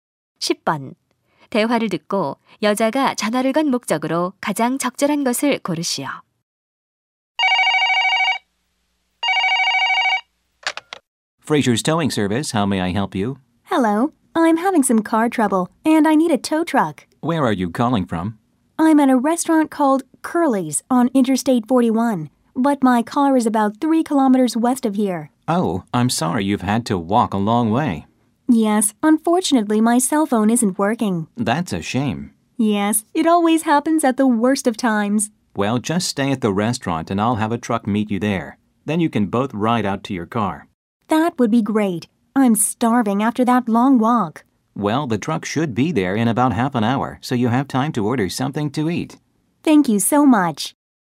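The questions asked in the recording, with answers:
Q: 대화를 듣고 여자가 전화를 건 목적으로 가장 적절한 것을 고르시오.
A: 견인차를 요청하려고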